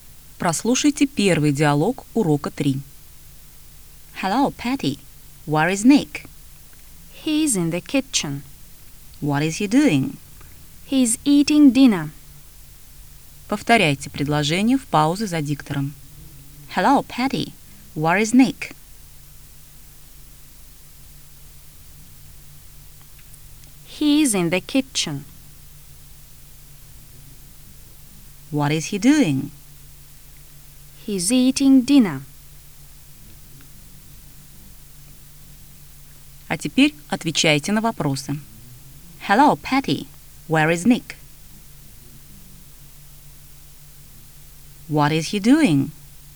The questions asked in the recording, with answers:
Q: Hello, Patty. Where is Nick?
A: He's in the kitchen.

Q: What is he doing?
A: He's eating dinner.